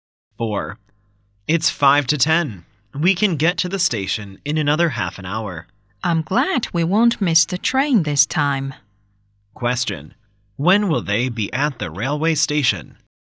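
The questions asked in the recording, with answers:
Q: When will they be at the railway station?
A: At about 10:25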